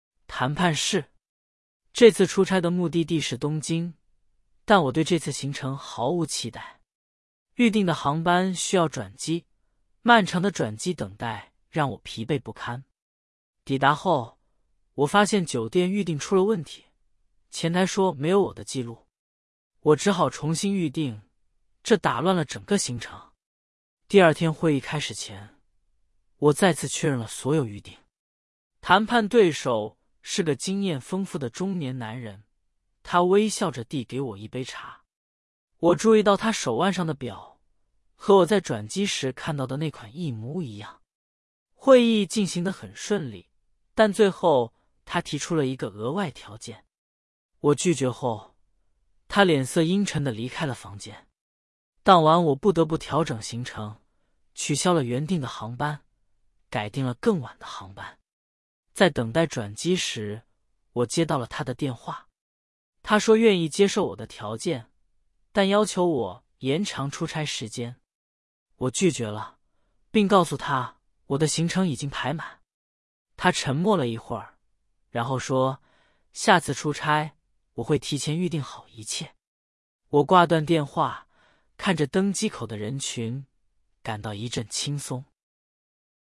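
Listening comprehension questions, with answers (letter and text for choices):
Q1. 这次出差的目的地是哪里?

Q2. 抵达后, 主人公遇到了什么问题?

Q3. 谈判对手提出了什么?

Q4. 主人公为什么拒绝了对手的要求?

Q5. 故事最后, 主人公感到怎样?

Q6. 主人公出差去哪个城市?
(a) 北京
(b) 东京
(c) 上海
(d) 大阪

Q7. 主人公的航班需要什么?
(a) 直飞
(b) 转机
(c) 取消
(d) 延误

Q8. 谈判对手是什么样的人?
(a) 年轻女性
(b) 中年男人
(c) 老年男人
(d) 年轻男性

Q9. 主人公注意到对手的什么?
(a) 手表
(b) 领带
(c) 鞋子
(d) 眼镜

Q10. 主人公最后取消了什么?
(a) 酒店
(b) 会议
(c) 航班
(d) 晚餐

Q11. 对手要求主人公做什么?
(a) 提前离开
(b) 延长出差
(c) 取消预订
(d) 更改航班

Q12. 主人公对这次出差充满期待。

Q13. 酒店预订没有问题。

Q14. 谈判对手是个年轻人。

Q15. 会议进行得很顺利。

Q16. 主人公接受了对手的额外条件。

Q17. 故事最后主人公感到轻松。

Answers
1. 东京
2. 酒店预订出了问题,前台没有他的记录
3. 一个额外条件
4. 他的行程已经排满
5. 一阵轻松
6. (b) 东京
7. (b) 转机
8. (b) 中年男人
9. (a) 手表
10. (c) 航班
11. (b) 延长出差
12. 错
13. 错
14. 错
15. 对
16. 错
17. 对

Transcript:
谈判室
这次出差的目的地是东京,但我对这次行程毫无期待。预订的航班需要转机,漫长的转机等待让我疲惫不堪。抵达后,我发现酒店预订出了问题,前台说没有我的记录。我只好重新预订,这打乱了整个行程。
第二天会议开始前,我再次确认了所有预订。谈判对手是个经验丰富的中年男人,他微笑着递给我一杯茶。我注意到他手腕上的表,和我在转机时看到的那款一模一样。会议进行得很顺利,但最后他提出了一个额外条件。我拒绝后,他脸色阴沉地离开了房间。
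当晚我不得不调整行程,取消了原定的航班,改订了更晚的航班。在等待转机时,我接到了他的电话。他说愿意接受我的条件,但要求我延长出差时间。我拒绝了,并告诉他我的行程已经排满。他沉默了一会儿,然后说:"下次出差,我会提前预订好一切。"我挂断电话,看着登机口的人群,感到一阵轻松。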